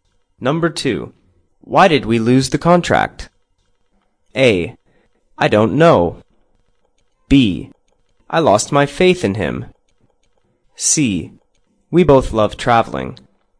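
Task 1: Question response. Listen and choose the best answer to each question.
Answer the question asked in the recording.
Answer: I don't know.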